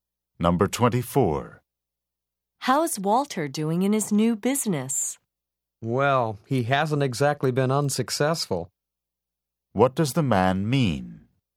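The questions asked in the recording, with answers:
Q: What does the man mean?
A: Walter has been fairly successful.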